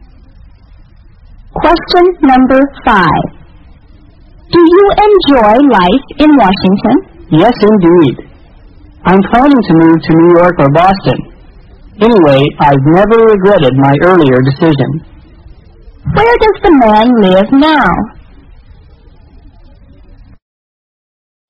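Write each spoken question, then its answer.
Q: Where does the man live now?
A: In Washington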